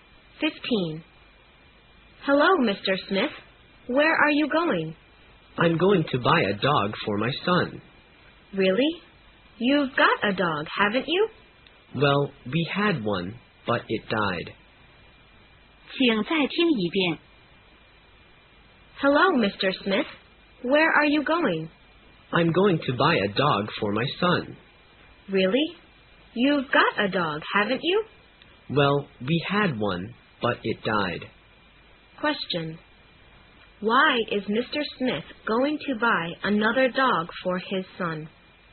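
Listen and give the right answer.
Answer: Because their dog died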